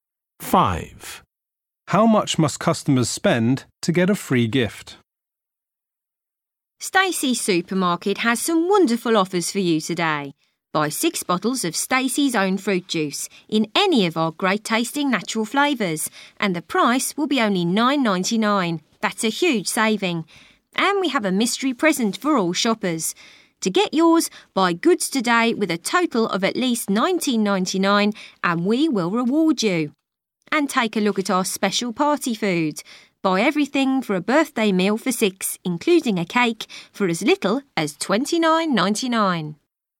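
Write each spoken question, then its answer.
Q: How much must customers spend to get a free gift?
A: $19.99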